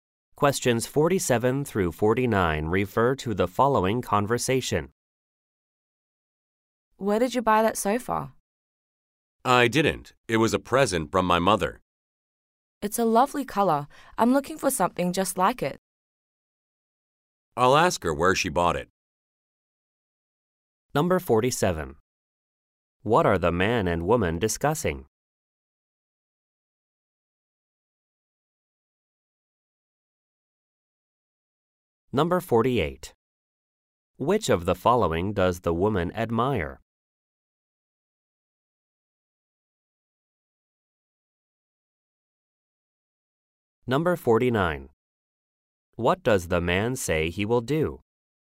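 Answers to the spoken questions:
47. A sofa
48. The sofa's color
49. Ask his mother where she bought it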